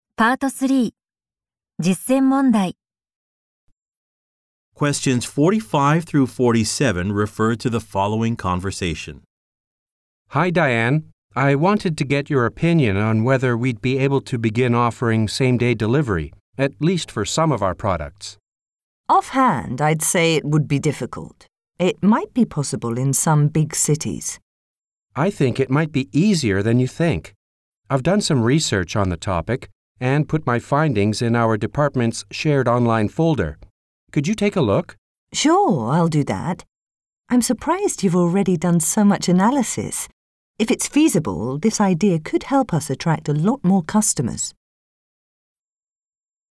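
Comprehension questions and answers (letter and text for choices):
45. What are the speakers mainly discussing?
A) Introducing a service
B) Creating new products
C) Surveying customers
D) Opening more stores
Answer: A) Introducing a service

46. According to the man, what can be found in an online folder?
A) A design proposal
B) Questions from clients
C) Research results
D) Market analysis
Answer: C) Research results

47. What is the woman surprised by?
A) The feedback from department staff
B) The lack of data on a new market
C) The originality of an employee's idea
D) The amount of work completed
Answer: D) The amount of work completed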